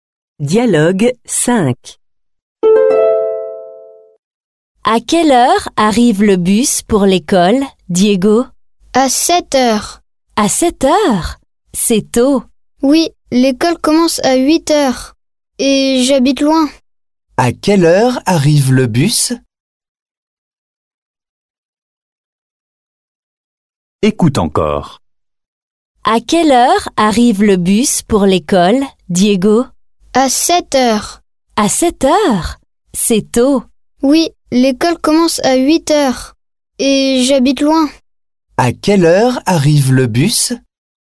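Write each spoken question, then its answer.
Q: À quelle heure arrive le bus?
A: À 7 heures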